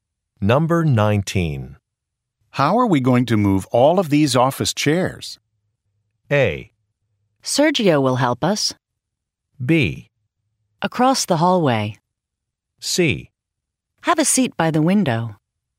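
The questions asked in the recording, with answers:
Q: How are we going to move all of these office chairs?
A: A: Sergio will help us.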